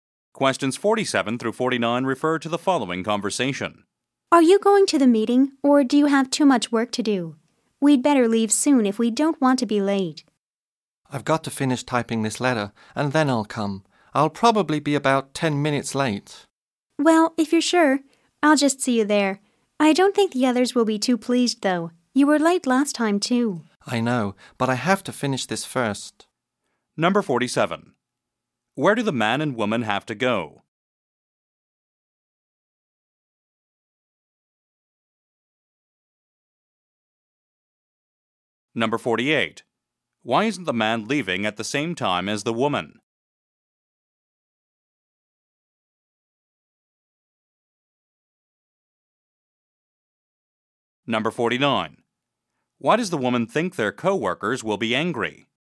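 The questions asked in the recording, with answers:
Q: Where do the man and woman have to go?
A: To a meeting

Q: Why isn't the man leaving at the same time as the woman?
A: He must finish typing a letter

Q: Why does the woman think their co-workers will be angry?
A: He was late last time too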